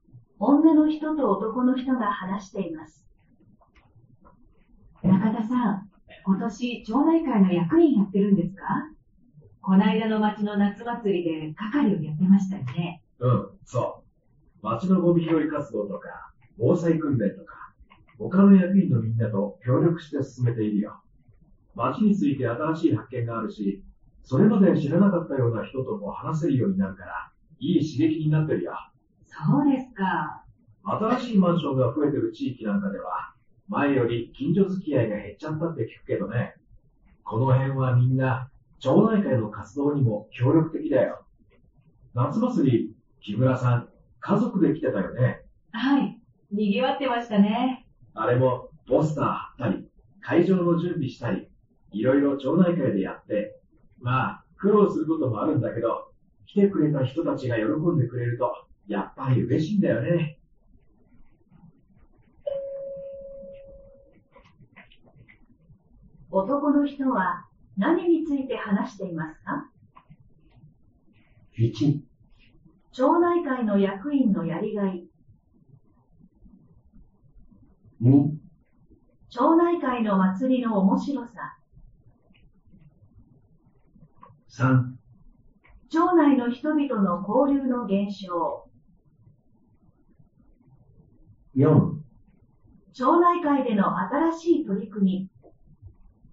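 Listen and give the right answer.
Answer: 1: 町内会の役員のやりがい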